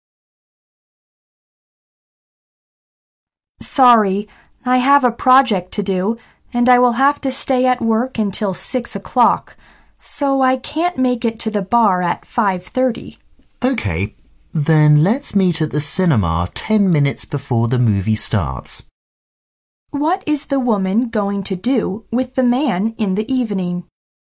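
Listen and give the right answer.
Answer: See a movie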